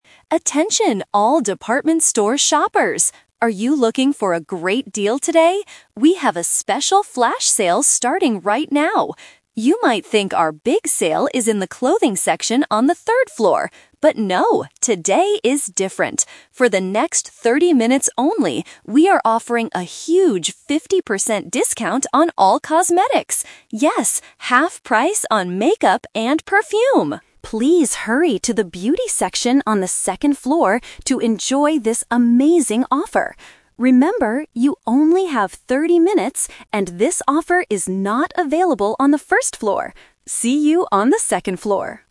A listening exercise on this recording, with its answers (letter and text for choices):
A store announcer is making an announcement over the PA system about a special flash sale. Listen to the announcement and choose the correct answer (A, B, or C) for each question.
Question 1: What items are on sale right now?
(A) Clothes.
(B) Cosmetics.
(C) Shoes.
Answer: (B) Cosmetics.

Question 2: How long will the flash sale last?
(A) For 15 minutes.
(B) For 30 minutes.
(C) All day.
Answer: (B) For 30 minutes.

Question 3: Which floor should customers go to for the sale?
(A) The first floor.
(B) The second floor.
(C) The third floor.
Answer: (B) The second floor.

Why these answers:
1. This is "The Twist". The announcer says, "You might think our big sale is in the clothing section... But no... we are offering a huge fifty percent discount on all cosmetics." Why the trap is wrong: Option (A) is the trap because clothes are mentioned first, but the announcer clearly says "But no." Option (C) is a plausible item in a store but is never mentioned.
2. The announcer explicitly states the time limit: "For the next thirty minutes only" and repeats "Remember, you only have thirty minutes." Why the trap is wrong: Option (A) is a different number trap. Option (C) is a trap for people who think sales usually last all day, but this is a "flash sale."
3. The announcer tells the shoppers to "hurry to the beauty section on the second floor." Why the trap is wrong: Options (A) and (C) are the traps. The third floor is where the clothes are, and the announcer specifically says the offer is "not available on the first floor."

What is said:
Announcer: Attention all department store shoppers! Are you looking for a great deal today? We have a special flash sale starting right now. You might think our big sale is in the clothing section on the third floor. But no, today is different. For the next thirty minutes only, we are offering a huge fifty percent discount on all cosmetics. Yes, half price on makeup and perfume! Please hurry to the beauty section on the second floor to enjoy this amazing offer. Remember, you only have thirty minutes, and this offer is not available on the first floor.